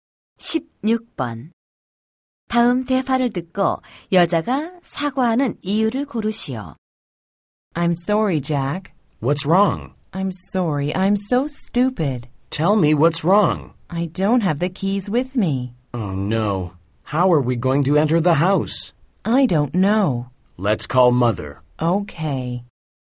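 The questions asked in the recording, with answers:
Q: 다음 대화를 듣고 여자가 사과하는 이유를 고르시오.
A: 열쇠를 가져오지 않아서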